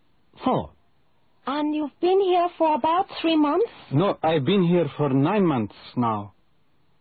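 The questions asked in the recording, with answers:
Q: And you've been here for about 3 months?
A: 9 months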